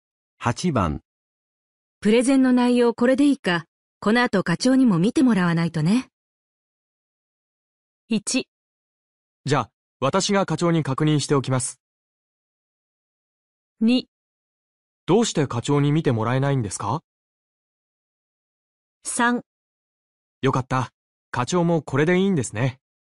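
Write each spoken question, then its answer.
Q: プレゼンの内容これでいいか、この後課長にも見てもらわないとね。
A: 1: じゃあ、私が課長に確認しておきます。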